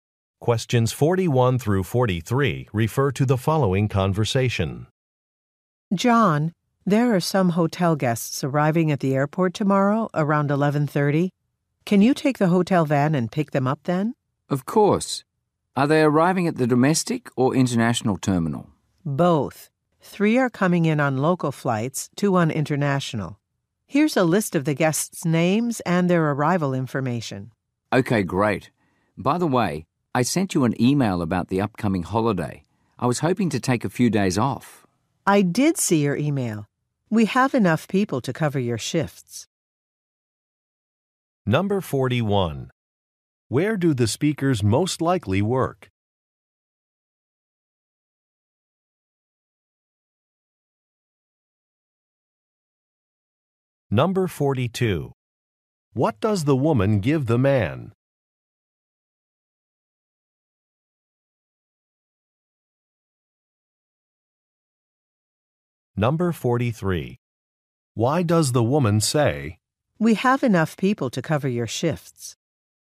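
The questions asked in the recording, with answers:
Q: Where do the speakers most likely work?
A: At a hotel

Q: What does the woman give the man?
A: A list of guests' names and arrival information

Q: "We have enough people to cover your shifts"?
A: To approve his request for time off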